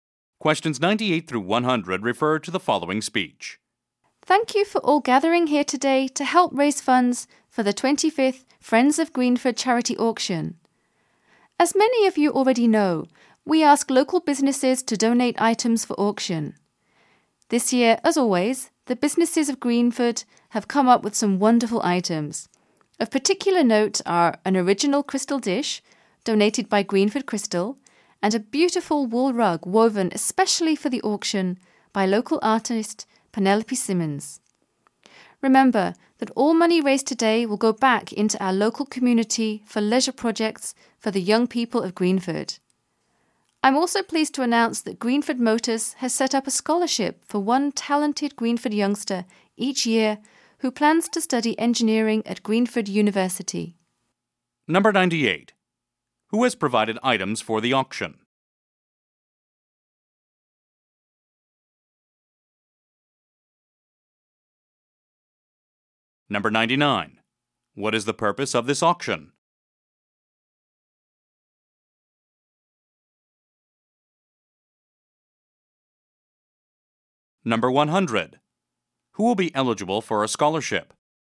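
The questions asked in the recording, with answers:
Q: Who has provided items for the auction?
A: Local businesses

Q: What is the purpose of this auction?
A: To raise money for leisure projects for Greenford's young people

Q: Who will be eligible for a scholarship?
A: A talented Greenford youngster planning to study engineering at Greenford University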